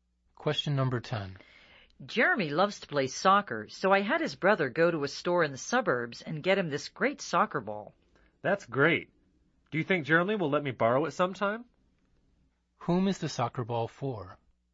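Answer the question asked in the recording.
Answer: Jeremy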